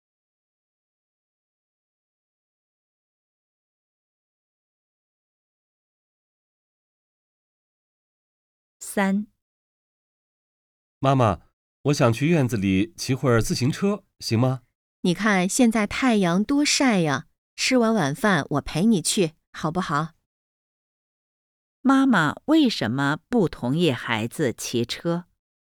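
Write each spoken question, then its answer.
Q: 妈妈为什么不同意孩子骑车?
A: 因为现在太阳太晒了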